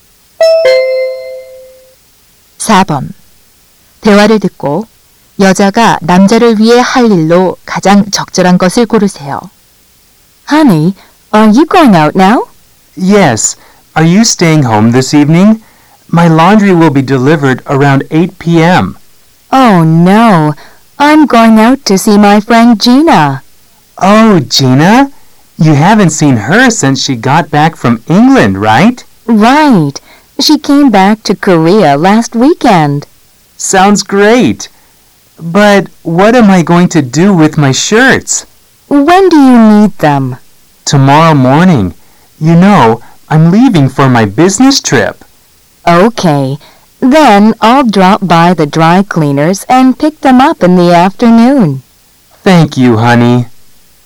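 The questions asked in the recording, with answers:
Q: 대화를 듣고 여자가 남자를 위해 할 일로 가장 적절한 것을 고르세요.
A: 세탁소에서 셔츠 찾아오기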